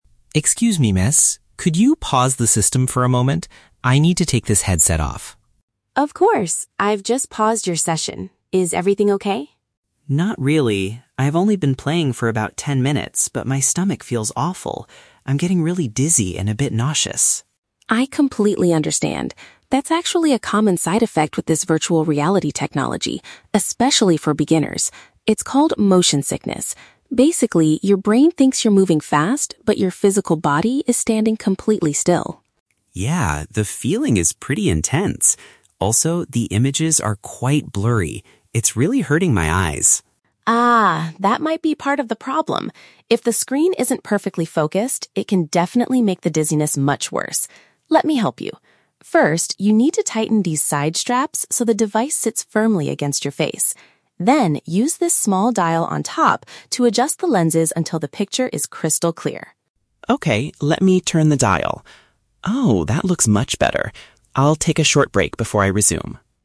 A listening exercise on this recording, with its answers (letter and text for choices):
Listen to a conversation between a player and a staff member at a VR gaming center. For each question, choose the correct answer (A, B, or C).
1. Why does Liam ask the staff member to stop the game?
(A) He wants to try a different virtual reality program.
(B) He has experienced a feeling of physical sickness.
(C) He has successfully completed his ten-minute session.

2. According to Maya, what is the main cause of "motion sickness" in VR?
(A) There is a conflict between what the mind sees and what the body does.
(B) The player is moving their head around the room too quickly.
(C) The game's graphics are moving too slowly for the human eye.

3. What should Liam do to fix the blurry images?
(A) Take off the headset and clean the glass lenses carefully.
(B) Pull the side straps so that they are as loose as possible.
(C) Turn a little knob on the device to bring the screen into focus.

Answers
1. (B) He has experienced a feeling of physical sickness.
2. (A) There is a conflict between what the mind sees and what the body does.
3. (C) Turn a little knob on the device to bring the screen into focus.

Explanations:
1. Liam says his "stomach feels awful" and he is "getting really dizzy and a bit nauseous." Option (B) correctly paraphrases these symptoms as "physical sickness." Option (A) is a trap; he stops because he feels sick, not to change the game. Option (C) is a trap; "ten minutes" is mentioned, but he didn't finish his session (Maya says she "paused" it).
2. Maya explains that "your brain thinks you're moving fast, but your physical body is standing completely still." Option (A) paraphrases this perfectly ("conflict" for the difference, "mind sees" for "brain thinks", "what the body does" for "body standing still"). Option (B) is a trap; the player's body is standing still, not moving quickly. Option (C) is not mentioned in the audio.
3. Maya instructs him to "use this small dial on top to adjust the lenses until the picture is crystal clear." Option (C) uses synonyms ("knob" for "dial", "bring the screen into focus" for "picture is crystal clear"). Option (A) is a trap; "lenses" are mentioned, but Maya never tells him to clean them. Option (B) is the exact opposite of the instruction; Maya tells him to "tighten" the straps, not make them "loose".

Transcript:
Liam: Excuse me, miss? Could you pause the system for a moment? I need to take this headset off.
Maya: Of course! I've just paused your session. Is everything okay?
Liam: Not really. I've only been playing for about ten minutes, but my stomach feels awful. I'm getting really dizzy and a bit nauseous.
Maya: I completely understand. That's actually a common side effect with this virtual reality technology, especially for beginners. It's called motion sickness. Basically, your brain thinks you're moving fast, but your physical body is standing completely still.
Liam: Yeah, the feeling is pretty intense. Also, the images are quite blurry. It's really hurting my eyes.
Maya: Ah, that might be part of the problem. If the screen isn't perfectly focused, it can definitely make the dizziness much worse. Let me help you. First, you need to tighten these side straps so the device sits firmly against your face. Then, use this small dial on top to adjust the lenses until the picture is crystal clear.
Liam: Okay, let me turn the dial. Oh, that looks much better. I'll take a short break before I resume.